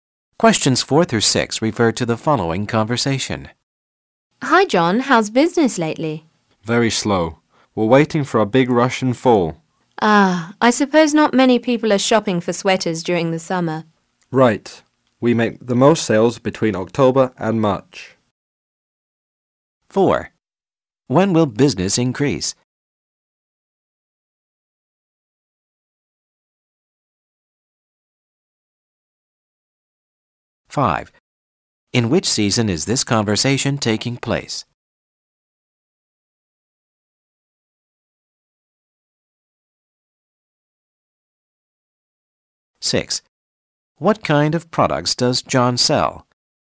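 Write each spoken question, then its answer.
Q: When will business increase?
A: In fall

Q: In which season is this conversation taking place?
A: Summer

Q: What kind of products does John sell?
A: Sweaters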